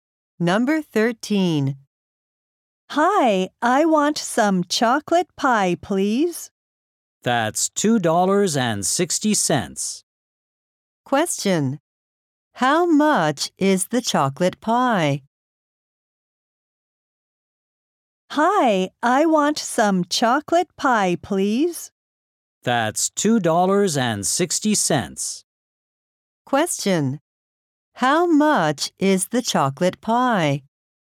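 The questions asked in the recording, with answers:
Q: How much is the chocolate pie?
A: $2.60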